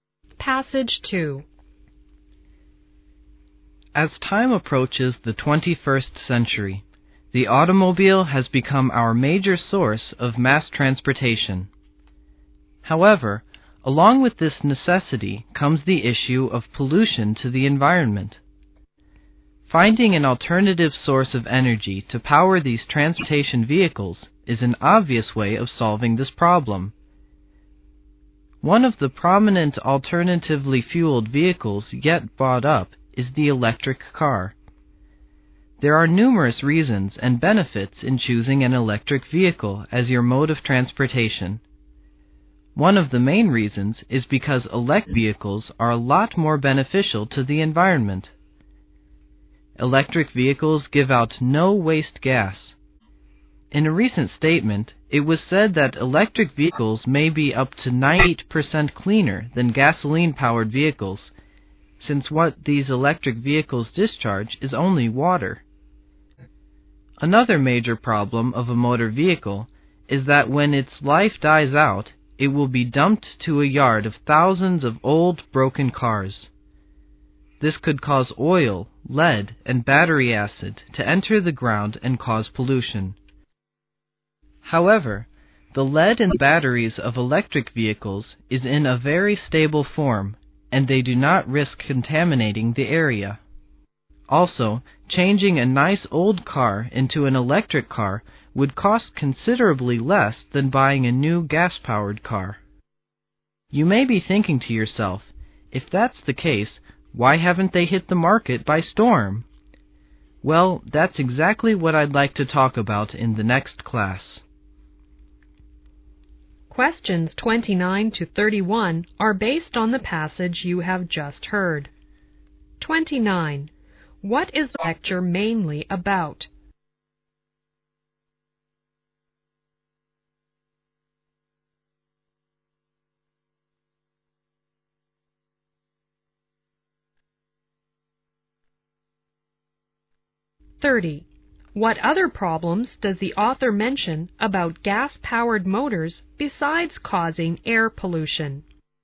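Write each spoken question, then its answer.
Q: What is the lecture mainly about?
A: The benefits of electric cars

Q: What other problems does the author mention about gas-powered motors besides causing air pollution?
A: Dumped old cars leak oil, lead and battery acid into the ground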